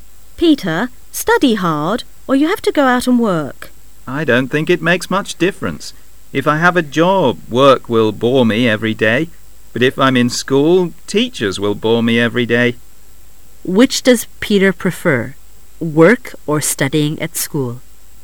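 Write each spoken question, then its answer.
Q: Which does Peter prefer, work or studying at school?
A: Neither; he thinks both are equally boring

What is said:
A
[解析] W:Peter,study hard,or you have to go out and work. M:I don't think it makes much difference.If I have a job,work will bore me every day;but if I'm in school,teachers will bore me every day. O:Which does Peter prefer,work or studying at school?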